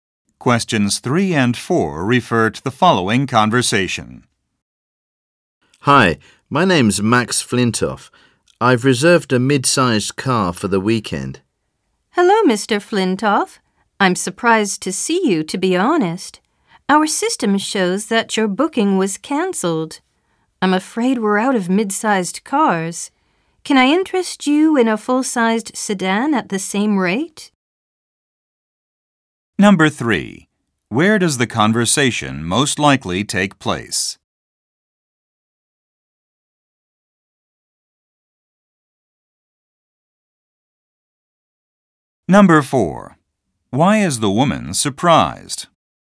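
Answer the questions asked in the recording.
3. At a car rental agency
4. The system shows his booking was cancelled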